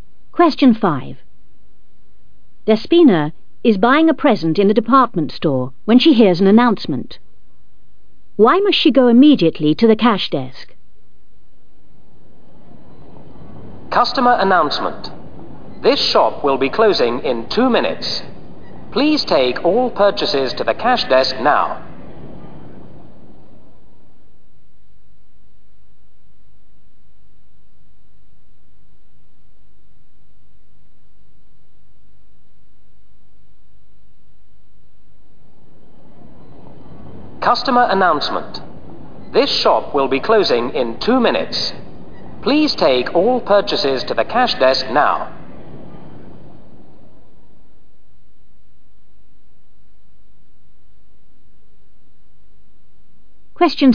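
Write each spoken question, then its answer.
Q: Why must she go immediately to the cash desk?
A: The shop is closing in 2 minutes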